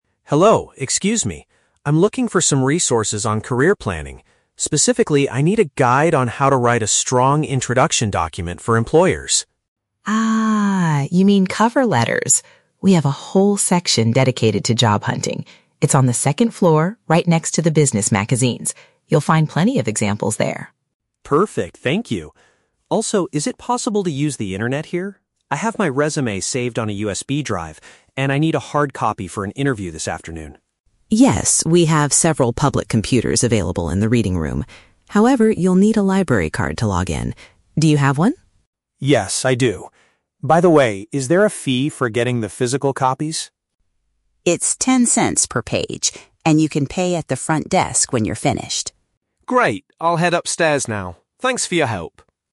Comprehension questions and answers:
Listen to the conversation between a library visitor and a librarian. Choose the correct answer (A, B, or C) for each question.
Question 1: What specific type of information is the man looking for?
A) Instructions on how to prepare for a job interview.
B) Materials to help him write a cover letter.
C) A list of local companies that are currently hiring.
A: Materials to help him write a cover letter.

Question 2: Where are the career planning books located?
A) On the second floor, beside the business magazines.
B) In the reading room, near the public computers.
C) On the first floor, right behind the front desk.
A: On the second floor, beside the business magazines.

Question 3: Why does the man want to use the library's computer?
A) To search the internet for new job openings.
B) To send his digital resume to an employer via email.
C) To print out a physical version of his job application.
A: To print out a physical version of his job application.

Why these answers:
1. Mark says he needs "a guide on how to write a strong introduction document for employers", which Mrs. Hig

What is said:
Mark: Hello, excuse me. I'm looking for some resources on career planning. Specifically, I need a guide on how to write a strong introduction document for employers.
Higgins: Ah, you mean cover letters? We have a whole section dedicated to job hunting. It's on the second floor, right next to the business magazines. You'll find plenty of examples there.
Mark: Perfect, thank you. Also, is it possible to use the internet here? I have my resume saved on a USB drive, and I need a hard copy for an interview this afternoon.
Higgins: Yes, we have several public computers available in the reading room. However, you'll need a library card to log in. Do you have one?
Mark: Yes, I do. By the way, is there a fee for getting the physical copies?
Higgins: It's ten cents per page, and you can pay at the front desk when you're finished.

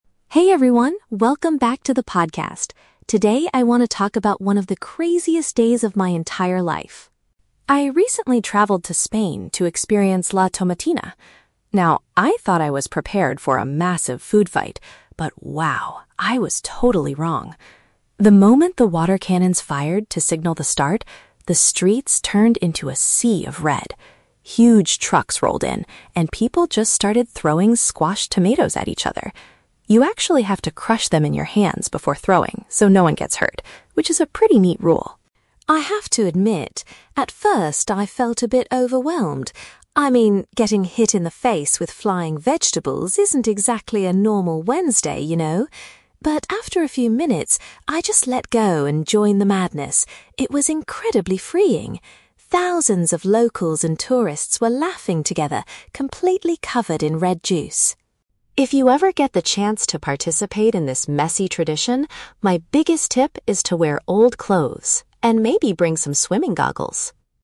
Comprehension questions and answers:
Listen to a travel blogger talking about a festival in Spain. Choose the correct answer (A, B, or C) for each question.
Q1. What safety measure must participants follow during the event?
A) They must wear protective eye gear at all times.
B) They have to smash the food before tossing it.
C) They are required to stay far away from the trucks.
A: They have to smash the food before tossing it.

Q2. How did the host's feelings change during the experience?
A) She initially felt stressed but soon enjoyed the liberating atmosphere.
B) She was excited at first but eventually became annoyed by the mess.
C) She felt scared of the crowds until she met some friendly locals.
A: She initially felt stressed but soon enjoyed the liberating atmosphere.

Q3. What practical advice does the host give to future visitors?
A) Buy enough tomatoes from the market beforehand.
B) Bring a clean towel to wash off the red juice.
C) Put on garments that you do not mind ruining.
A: Put on garments that you do not mind ruining.

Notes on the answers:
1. The host says, "You actually have to crush them in your hands before throwing so no one gets hurt" (smash the food before tossing it). Option (A) is a trap; the host suggests swimming goggles at the very end as a helpful tip ("maybe bring some"), not a mandatory safety measure. Option (C) is a plausible safety rule for large vehicles, but it is not mentioned in the audio.
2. The host admits she "felt a bit overwhelmed" at first (stressed), but then she "joined the madness" and found it "incredibly freeing" (enjoyed the liberating atmosphere). Option (B) is a trap using the word "messy", but her feelings went from overwhelmed to happy, not excited to annoyed. Option (C) is a trap; she mentions "locals" but doesn't say she was scared of them.
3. The host's biggest tip is to "wear old clothes" (garments that you do not mind ruining because they are already old). Option (A) is a trap; the trucks bring the tomatoes, tourists don't need to buy them. Option (B) is a plausible piece of advice for a messy festival, but the host never mentions bringing a towel.

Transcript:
Host: Hey everyone, welcome back to the podcast! Today, I want to talk about one of the craziest days of my entire life.
I recently traveled to Spain to experience La Tomatina. Now, I thought I was prepared for a massive food fight, but wow... I was totally wrong. The moment the water cannons fired to signal the start, the streets turned into a sea of red. Huge trucks rolled in, and people just started throwing squashed tomatoes at each other. You actually have to crush them in your hands before throwing so no one gets hurt, which is a pretty neat rule.
I have to admit, at first, I felt a bit overwhelmed. I mean, getting hit in the face with flying vegetables isn't exactly a normal Wednesday, you know? But after a few minutes, I just let go and joined the madness. It was incredibly freeing! Thousands of locals and tourists were laughing together, completely covered in red juice.
If you ever get the chance to participate in this messy tradition, my biggest tip is to wear old clothes—and maybe bring some swimming goggles!

